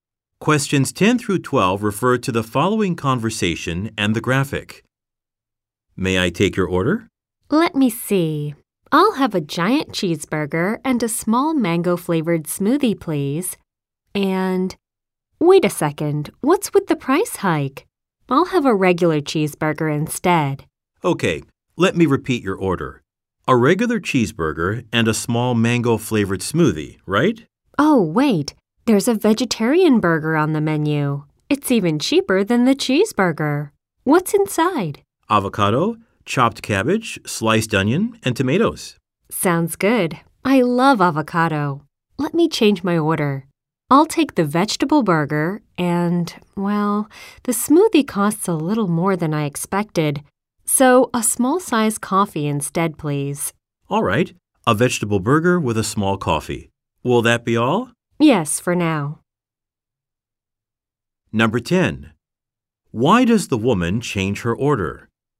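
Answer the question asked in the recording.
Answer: Because of the price increase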